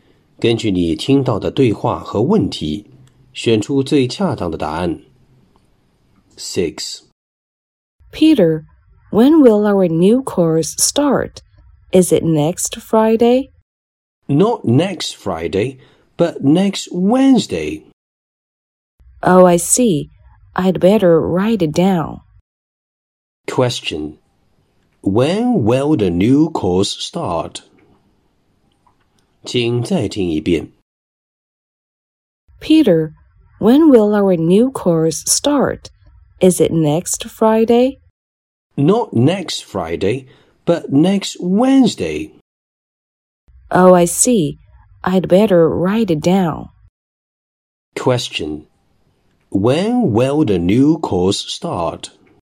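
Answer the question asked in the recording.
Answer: Next Wednesday.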